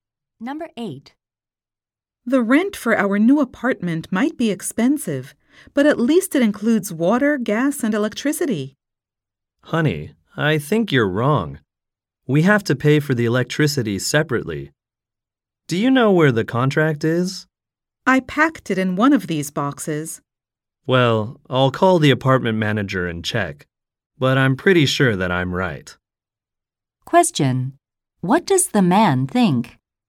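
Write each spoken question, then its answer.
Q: What does the man think?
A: Electricity is not included in the rent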